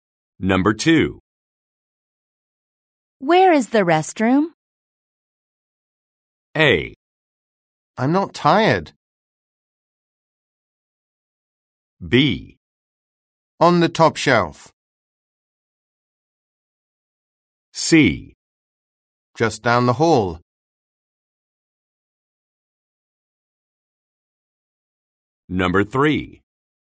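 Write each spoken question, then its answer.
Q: Where is the restroom?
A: C: Just down the hall.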